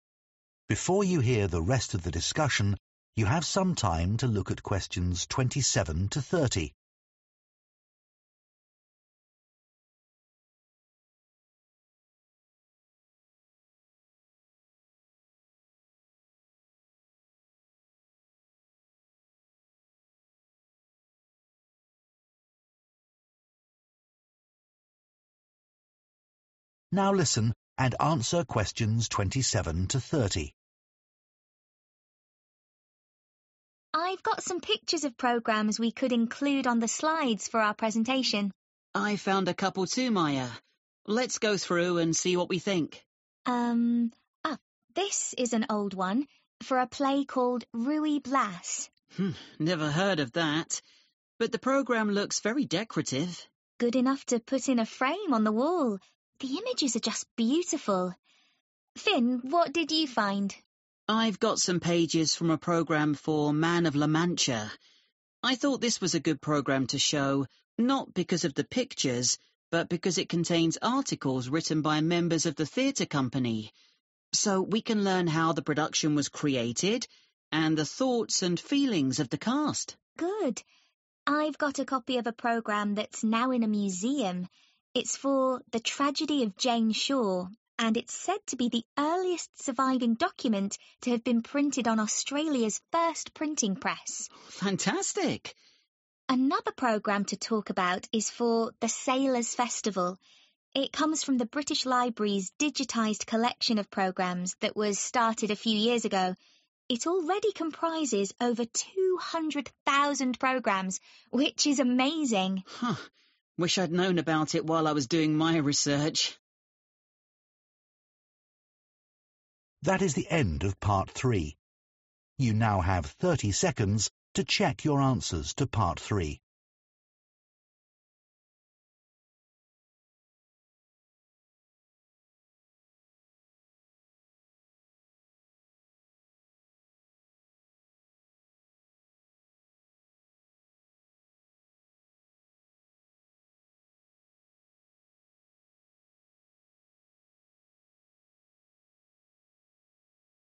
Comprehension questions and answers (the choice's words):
Choose FOUR answers from the box and write the correct letter, A–F, next to Questions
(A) Its origin is somewhat controversial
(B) It is historically significant for a country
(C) It was effective at attracting audiences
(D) It is included in a recent project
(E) It contains insights into the show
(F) It resembles an artwork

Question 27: Ruy Blas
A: It resembles an artwork

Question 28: Man of La Mancha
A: It contains insights into the show

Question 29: The Tragedy of Jane Shore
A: It is historically significant for a country

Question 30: The Sailors' Festival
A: It is included in a recent project

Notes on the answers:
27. The correct answer is F because Maya describes the programme for Ruy Blas as 'very decorative' and good 'enough to put in a frame on the wall,' which shows that it looks like artwork.
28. The correct answer is 'E' because Finn mentions that the programme contains articles written by members of the theatre company. This provides insights into how the production was made and the feelings of the actors, which is valuable information for understanding the show.
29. The correct answer is B because Maya mentions that the programme for The Tragedy of Jane Shore is said to be the earliest surviving document printed on Australia's first printing press. This shows its historical importance to Australia.
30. The correct answer is D because Maya mentions that the programme for The Sailors' Festival comes from the British Library's digital collection, which is a recent project that includes many theatre programmes.

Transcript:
FINN While here in the UK, programmes became merely a single sheet of paper folded to create four pages for text.
MAYA What I don't really get is that after the war they didn't go back to being more than one sheet or change in any way for over 25 years. I know there were paper shortages after the war, but only for five or ten years.
FINN Strange.
MAYA I got some pictures of programmes we could include on the slides for our presentation.
FINN I found a couple too Maya. Let go through and see what we think
MAYA Um oh this is an old one for a play called Ruey Blass
FINN Never heard of that. But the programme looks very decorative.
MAYA Good enough to put in a frame on the wall. The images are just beautiful. Finn, what did you find?
FINN I've got some pages from a programme for Man of La Mancha. I thought this was a good programme to show, not because of the pictures, but because it contains articles written by members of the theatre company, so we can learn how the production was created and the thoughts and feelings of the cast.
MAYA Good. I've got a copy of a programme that's now in a museum. It's for The Tragedy of Jane Shore and it's said to be the earliest surviving document to have been printed on Australia's first printing press
FINN Fantastic!
MAYA Another programme to talk about is for The Sailors Festival. It comes from the British Library's digitised collection of programmes that was started a few years ago. It already comprises over 200,000 programmes which is amazing!
FINN Huh. Wish I'd known about it while I was doing my research.